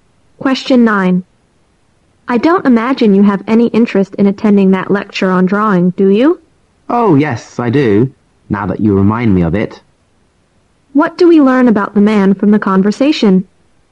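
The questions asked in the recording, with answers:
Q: What do we learn about the man from the conversation?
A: He wants to attend the lecture on drawing.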